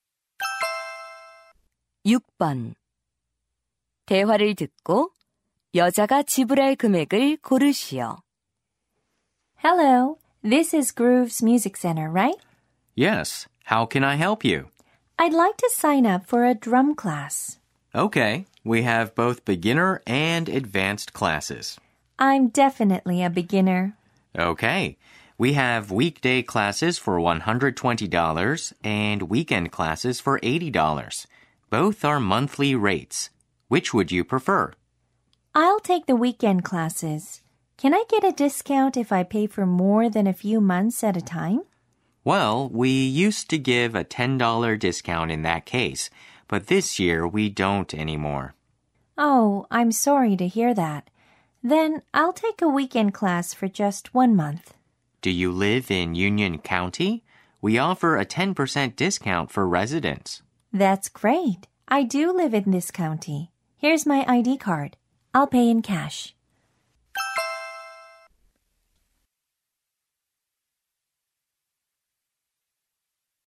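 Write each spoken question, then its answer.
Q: 대화를 듣고 여자가 지불할 금액을 고르시오.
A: $72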